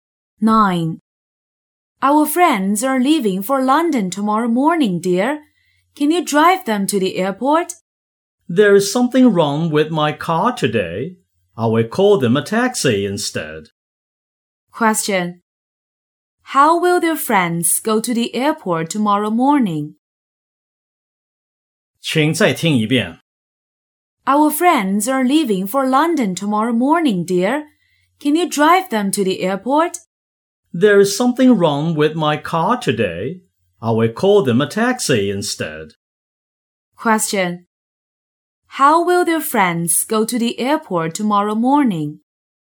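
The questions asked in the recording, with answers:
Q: How will their friends go to the airport tomorrow morning?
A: By taxi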